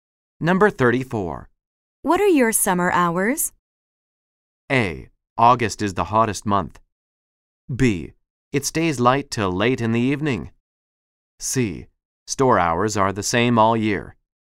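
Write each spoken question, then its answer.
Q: What are your summer hours?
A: C: Store hours are the same all year.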